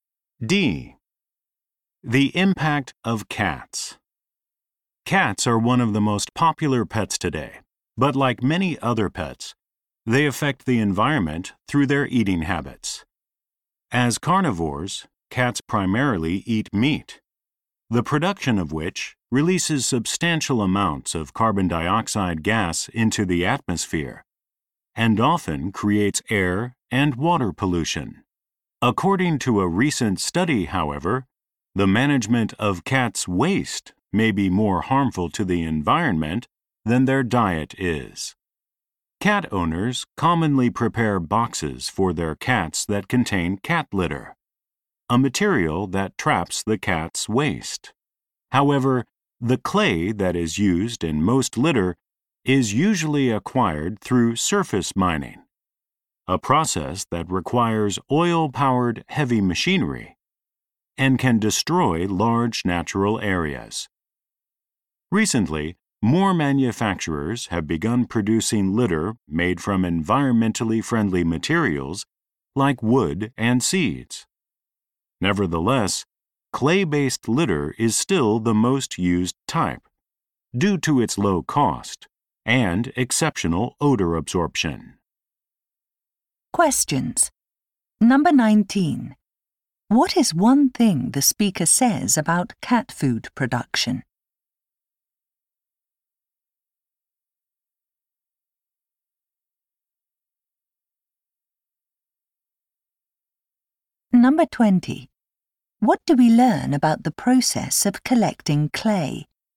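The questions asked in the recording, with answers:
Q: What is one thing the speaker says about cat food production?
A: It releases a lot of carbon dioxide and causes pollution

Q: What do we learn about the process of collecting clay?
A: It uses oil-powered heavy machinery and can destroy large natural areas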